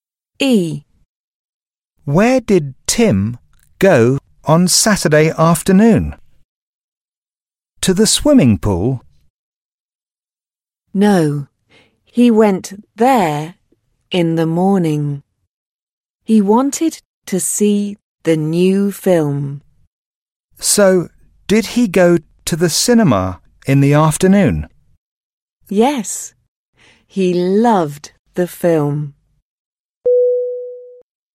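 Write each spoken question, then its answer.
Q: Where did Tim go on Saturday afternoon?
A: to the cinema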